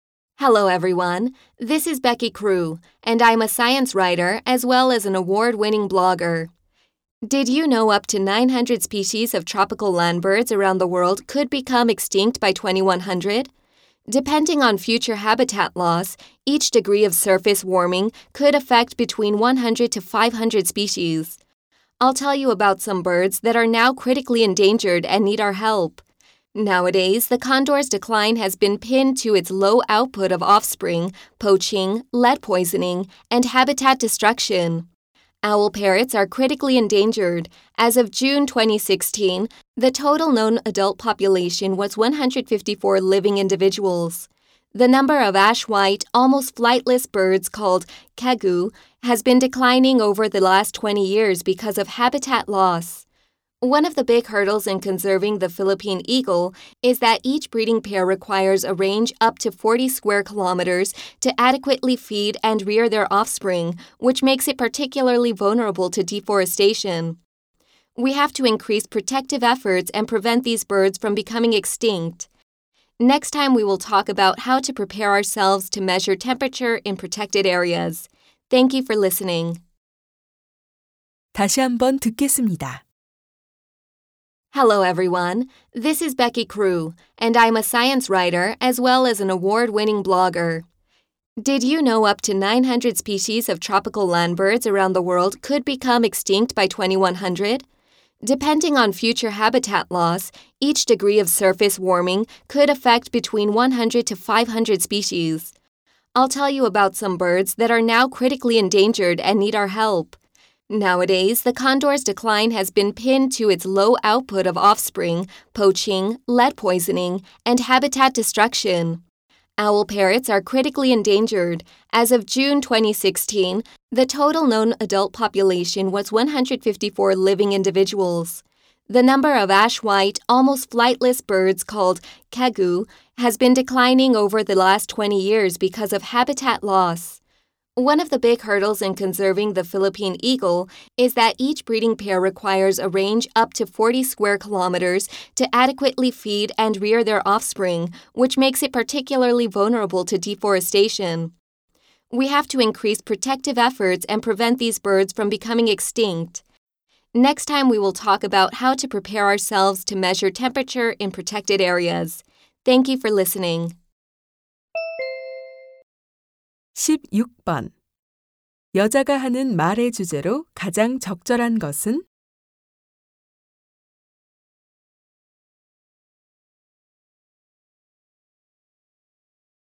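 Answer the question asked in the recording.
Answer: 멸종 위기에 처한 새들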